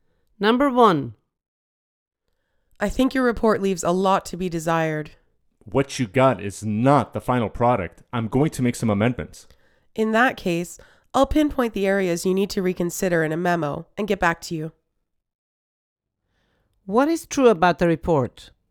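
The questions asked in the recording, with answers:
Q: What is true about the report?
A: It is not the final version; it needs improvement and will be amended.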